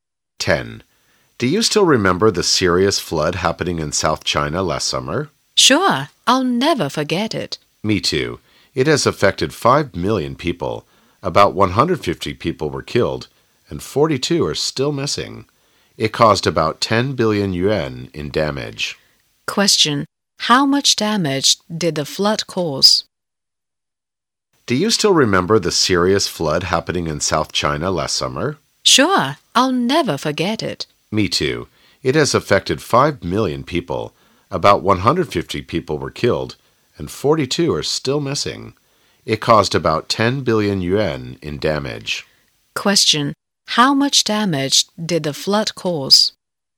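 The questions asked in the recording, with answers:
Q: Question. How much damage did the flood cause?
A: About 10 billion yuan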